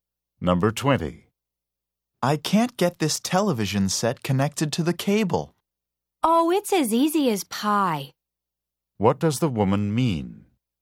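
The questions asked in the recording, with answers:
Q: What does the woman mean?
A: Connecting the TV is very easy.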